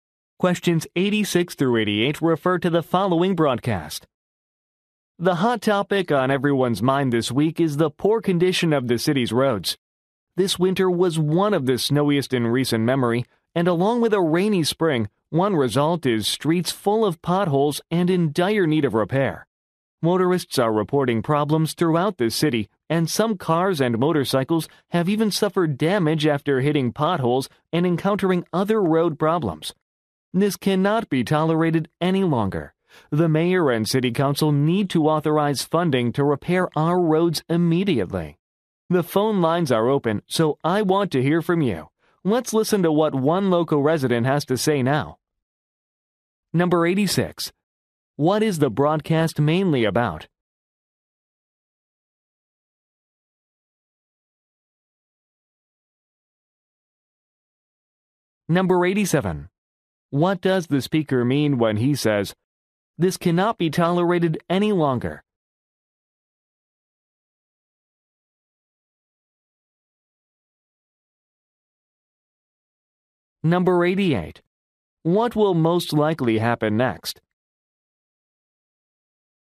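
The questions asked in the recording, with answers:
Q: What is the broadcast mainly about?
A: The poor condition of the city's roads

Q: What does the speaker mean when he says, "This cannot be tolerated any longer"?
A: The roads must be repaired immediately

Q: What will most likely happen next?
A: A local resident caller will speak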